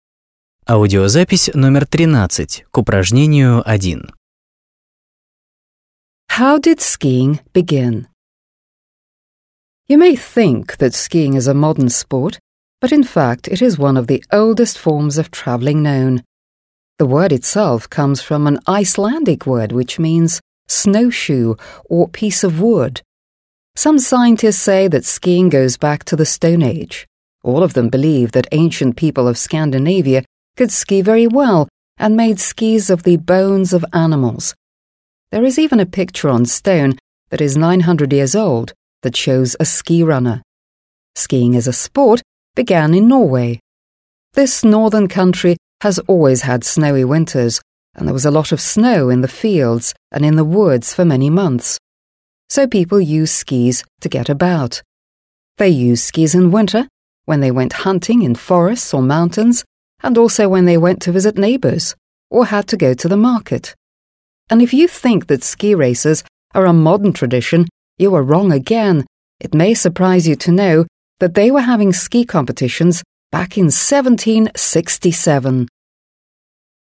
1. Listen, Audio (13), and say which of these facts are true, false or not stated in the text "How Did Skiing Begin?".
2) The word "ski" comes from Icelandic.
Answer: True

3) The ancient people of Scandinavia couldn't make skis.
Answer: False

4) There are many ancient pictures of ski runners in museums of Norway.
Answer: Not stated

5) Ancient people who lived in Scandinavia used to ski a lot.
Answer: True

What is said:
How did skiing begin?
You may think that skiing is a modern sport, but in fact it is one of the oldest forms of traveling known. The word itself comes from an Icelandic word which means «snow shoe» or «piece of wood». Some scientists say that skiing goes back to the stone age. All of them believe that ancient people of Scandinavia could ski very well and made skis of the bones of animals. There is even a picture on stone that is 900 years old that shows ski runner. Skiing as a sport began in Norway. This northern country has always had snow in winters and there was a lot of snow in the fields and in the woods for many months. So, people use skis to get about. They use skis in winter when they went hunting in forest or mountains, and also when they went to visit neighbours or had to go to the market. And if you think that ski races are a modern tradition, you are wrong again. It may surprise you to know that they were having ski competitions back in 1767.

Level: 8 класс